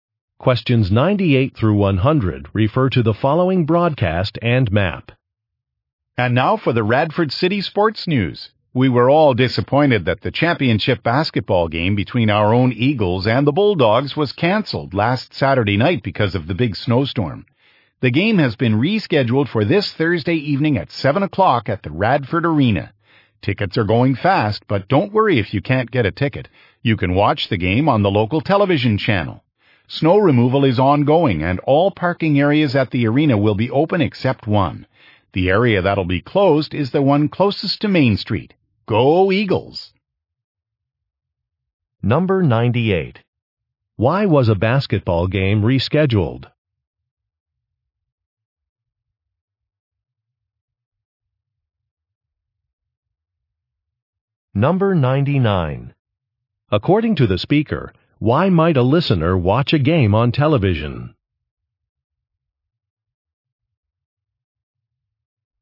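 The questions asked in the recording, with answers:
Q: Why was a basketball game rescheduled?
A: Because of a snowstorm

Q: According to the speaker, why might a listener watch a game on television?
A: Tickets may sell out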